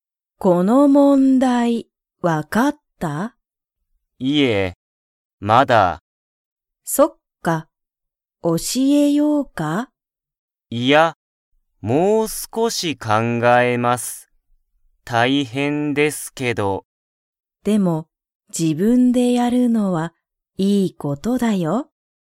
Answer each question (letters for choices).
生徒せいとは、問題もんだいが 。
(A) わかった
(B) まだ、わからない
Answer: B

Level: Level 1